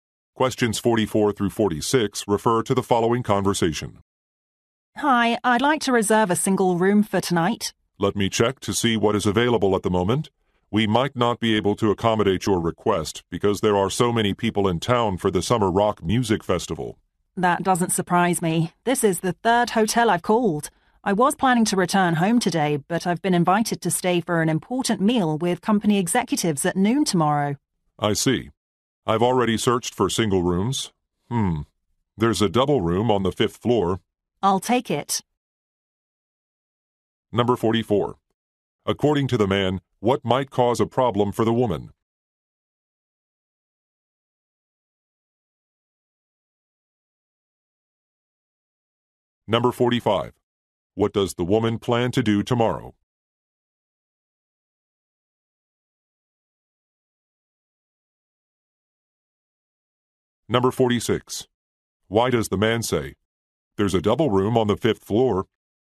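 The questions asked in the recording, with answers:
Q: According to the man, what might cause a problem for the woman?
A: Crowds in town for a music festival

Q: What does the woman plan to do tomorrow?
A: Have a lunch meal with company executives

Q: Why does the man say, "There's a double room on the fifth floor"?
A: To offer an alternative since no single rooms are available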